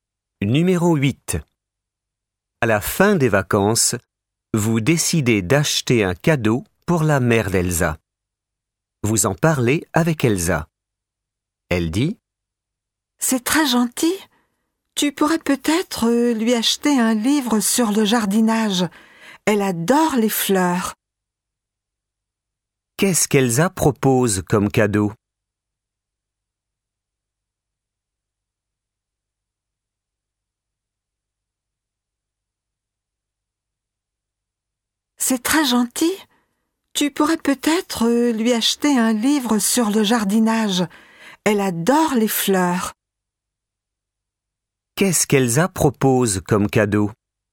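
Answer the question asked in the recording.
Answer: Un livre sur le jardinage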